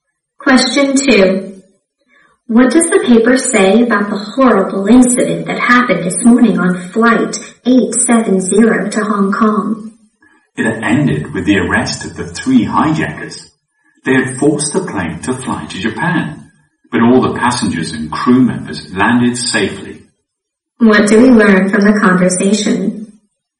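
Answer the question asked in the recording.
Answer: The hijackers were arrested and everyone on board landed safely.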